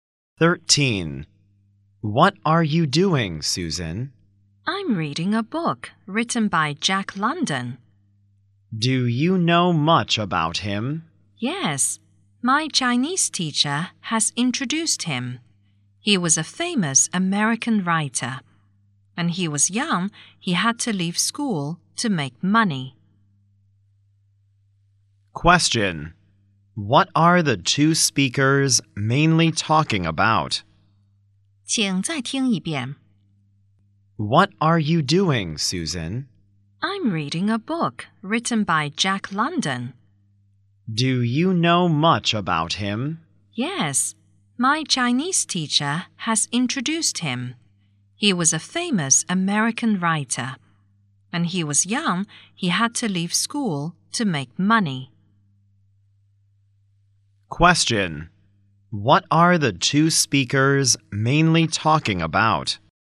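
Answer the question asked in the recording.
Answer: Jack London, an American writer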